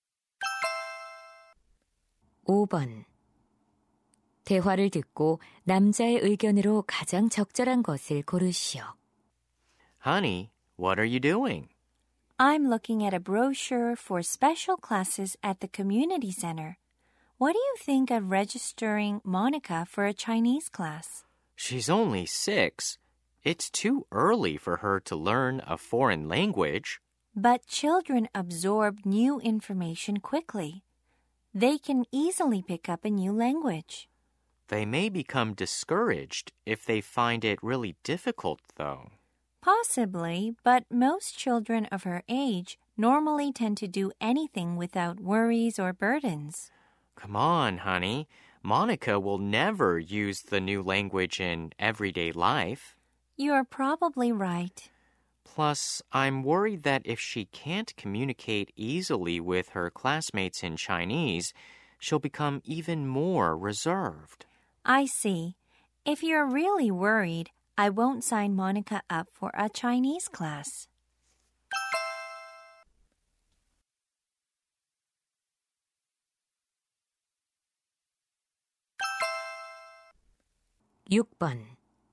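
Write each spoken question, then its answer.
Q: 대화를 듣고 남자의 의견으로 가장 적절한 것을 고르시오.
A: 어린 아이에게 외국어를 너무 일찍 가르치는 것은 바람직하지 않다.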